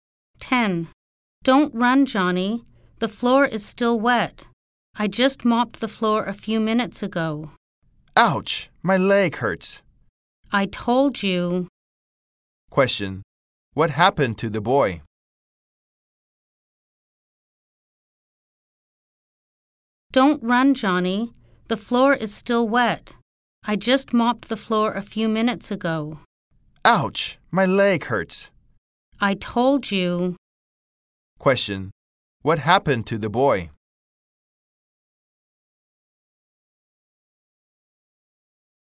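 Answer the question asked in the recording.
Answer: He slipped on the wet floor and hurt his leg.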